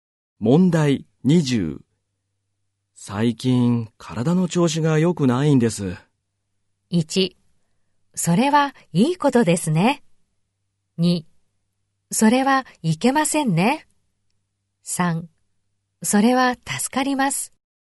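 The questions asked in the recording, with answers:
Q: 最近体の調子が良くないんです。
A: 2: それはいけませんね。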